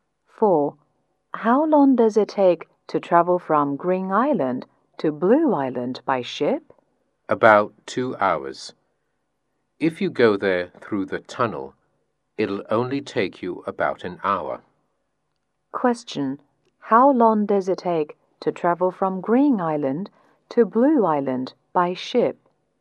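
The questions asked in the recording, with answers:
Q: How long does it take to travel from Green Island to Blue Island by ship?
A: About 2 hours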